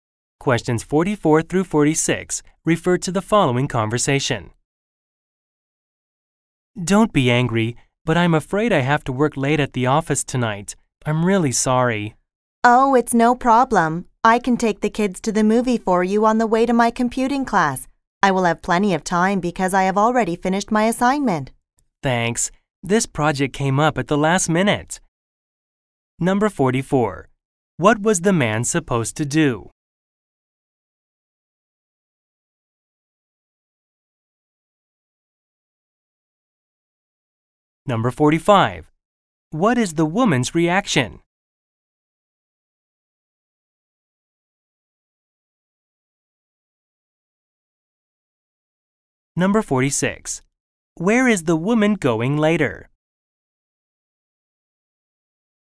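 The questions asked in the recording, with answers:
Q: What was the man supposed to do?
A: Take the kids to the movie

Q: What is the woman's reaction?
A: She says it's no problem

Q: Where is the woman going later?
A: To her computing class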